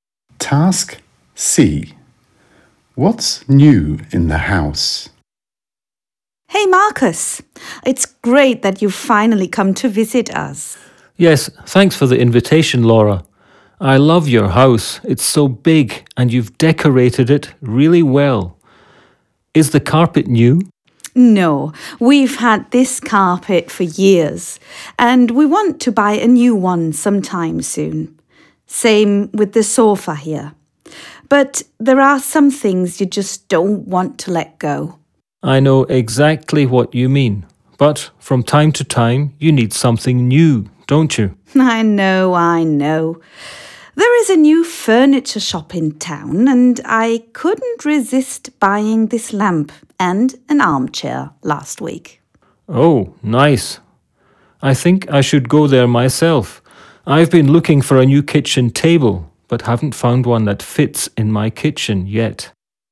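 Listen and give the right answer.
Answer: A lamp and an armchair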